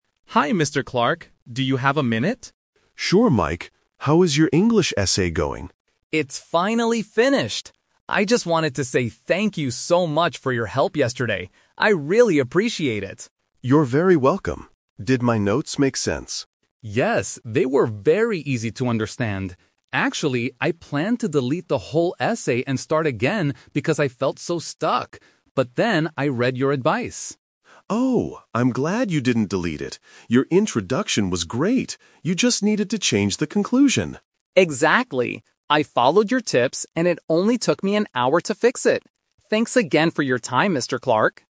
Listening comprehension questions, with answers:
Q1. What is Mike thanking Mr. Clark for?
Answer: Helping him with his English essay.

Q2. What did Mike originally plan to do with his essay?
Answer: Delete it and start again.

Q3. How long did it take Mike to fix the essay?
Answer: One hour.

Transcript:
Mike: Hi, Mr. Clark. Do you have a minute?
Mr. Clark: Sure, Mike. How is your English essay going?
Mike: It's finally finished! I just wanted to say thank you so much for your help yesterday. I really appreciate it.
Mr. Clark: You're very welcome. Did my notes make sense?
Mike: Yes, they were very easy to understand. Actually, I planned to delete the whole essay and start again because I felt so stuck. But then I read your advice.
Mr. Clark: Oh, I'm glad you didn't delete it! Your introduction was great. You just needed to change the conclusion.
Mike: Exactly. I followed your tips, and it only took me an hour to fix it. Thanks again for your time, Mr. Clark.